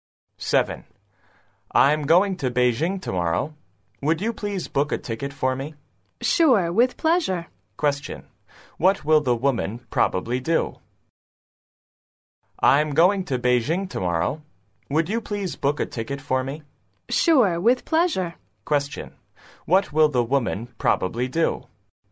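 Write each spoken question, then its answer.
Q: What will the woman probably do?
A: Book a ticket to Beijing for the man.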